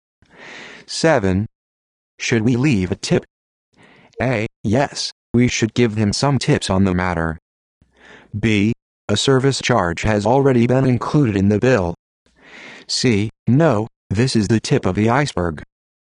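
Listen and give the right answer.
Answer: B: A service charge has already been included in the bill.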